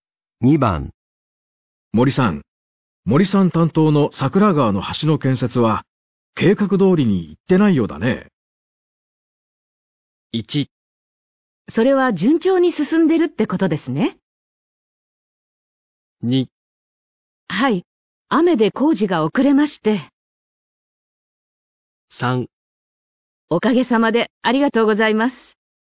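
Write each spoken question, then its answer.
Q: 森さん、森さん担当の桜川の橋の建設は計画通りに行ってないようだね。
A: 2: はい、雨で工事が遅れまして。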